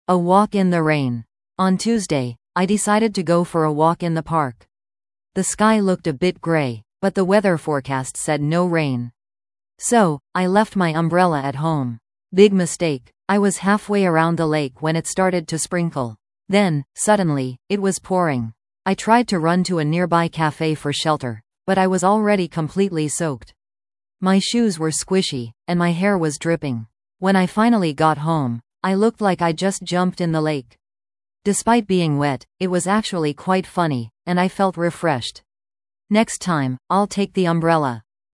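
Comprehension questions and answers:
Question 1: What did the narrator forget to bring on their walk?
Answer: An umbrella

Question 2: What happened during the narrator's walk in the park?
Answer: It started to rain heavily and the narrator got soaked

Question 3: How did the narrator feel when she finally got home?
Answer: She found it funny and felt refreshed

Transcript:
A Walk in the Rain
On Tuesday, I decided to go for a walk in the park. The sky looked a bit grey, but the weather forecast said no rain. So, I left my umbrella at home. Big mistake! I was halfway around the lake when it started to sprinkle. Then, suddenly, it was pouring! I tried to run to a nearby cafe for shelter, but I was already completely soaked. My shoes were squishy, and my hair was dripping. When I finally got home, I looked like I'd just jumped in the lake! Despite being wet, it was actually quite funny, and I felt refreshed. 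Next time, I'll take the umbrella!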